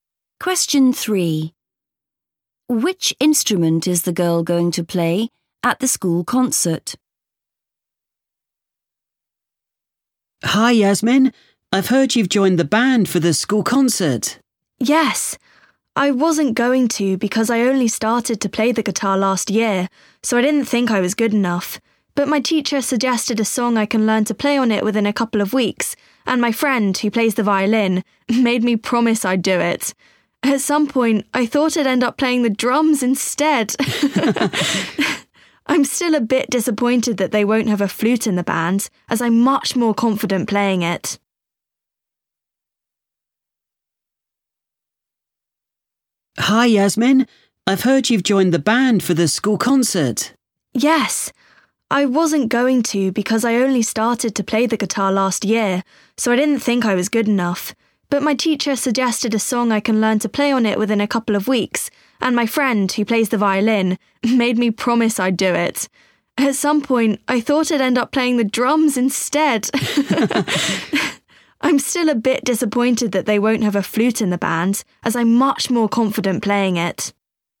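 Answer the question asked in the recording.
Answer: The guitar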